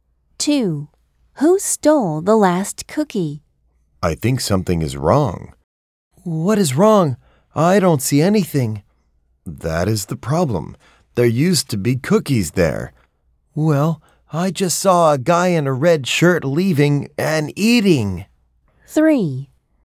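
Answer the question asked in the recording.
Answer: A guy in a red shirt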